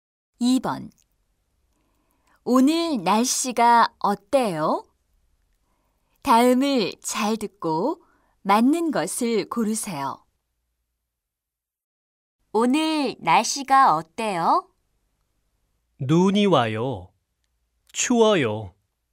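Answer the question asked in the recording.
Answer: 눈이 와요. 추워요.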